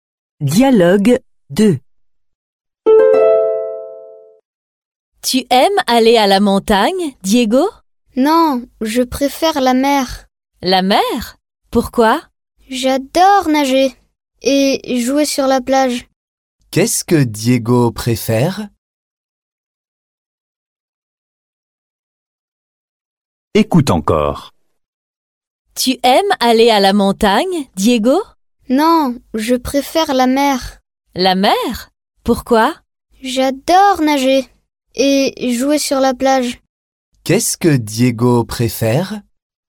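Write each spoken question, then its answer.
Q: Qu'est-ce que Diego préfère?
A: la mer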